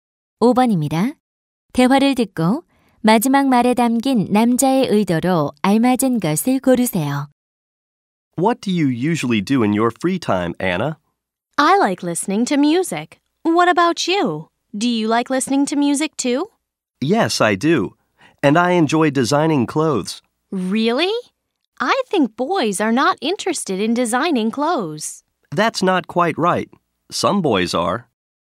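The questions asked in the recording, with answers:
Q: 대화를 듣고 마지막 말에 담긴 남자의 의도로 알맞은 것을 고르세요.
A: 반대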